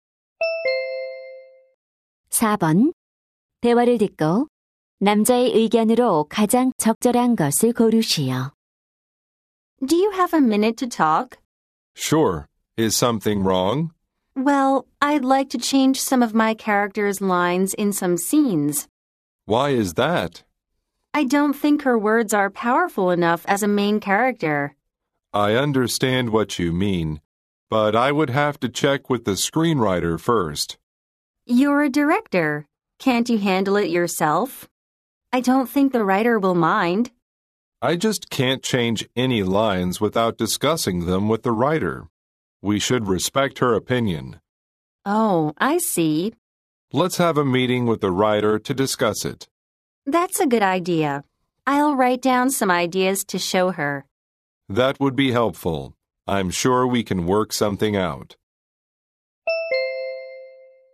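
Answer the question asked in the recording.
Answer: 대사를 바꾸려면 작가와 먼저 상의하고 작가의 의견을 존중해야 한다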